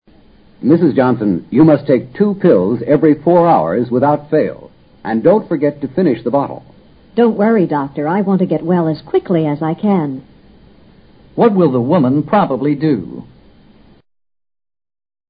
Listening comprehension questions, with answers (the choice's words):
What will the woman probably do?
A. Take four pills.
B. Hesitate to take any pills.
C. Take the doctor's advice.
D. Take eight pills.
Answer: Take the doctor's advice.

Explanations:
从她说话的口气判断,她想尽快恢复健康,当然她会遵照医生的嘱咐吃药的。A,D均与医嘱不符,不能成立。医生说每4小时吃两片,直到将瓶中药片吃完。至于瓶中有多少药片,不得而知。所以吃4片或吃8片皆不符医嘱。 without fail: 务必;一定要。

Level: 世博高级听说